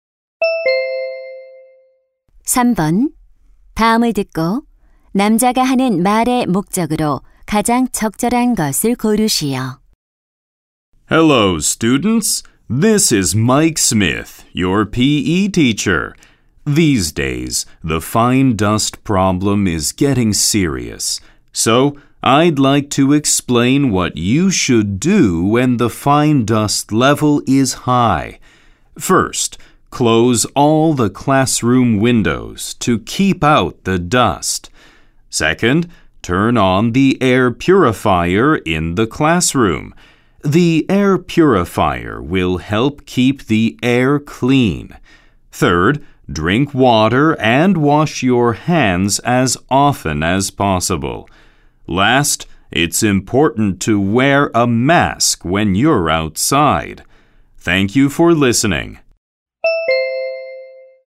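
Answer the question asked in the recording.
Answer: 미세먼지 농도가 높을 때의 행동 요령을 안내하려고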